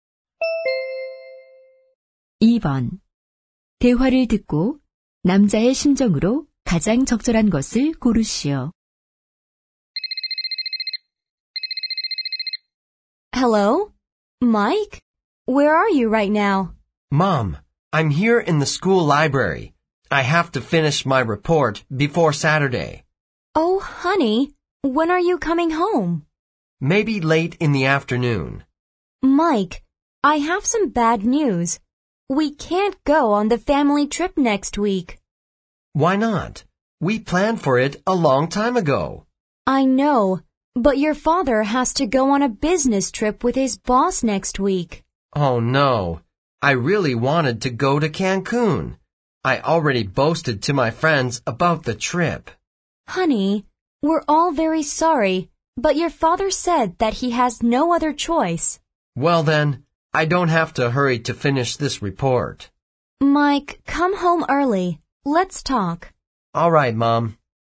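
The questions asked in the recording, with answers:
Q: 대화를 듣고 남자의 심정으로 가장 적절한 것을 고르시오.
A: 실망함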